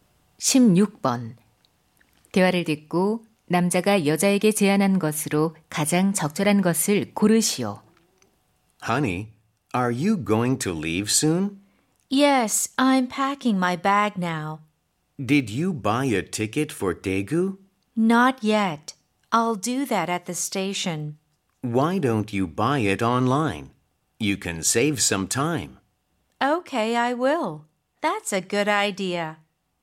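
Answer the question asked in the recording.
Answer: 온라인으로 표 구매하기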